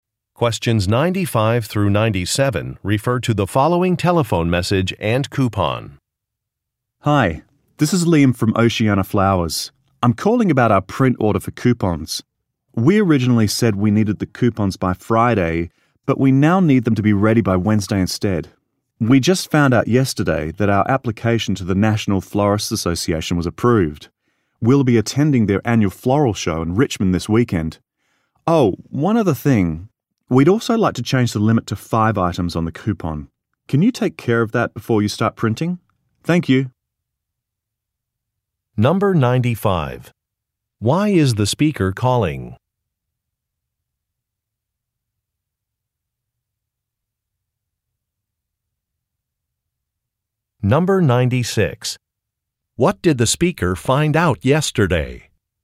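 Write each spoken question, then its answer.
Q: Why is the speaker calling?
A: To change the deadline of a coupon print order (needs them by Wednesday instead of Friday)

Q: What did the speaker find out yesterday?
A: Their application to the National Florists Association was approved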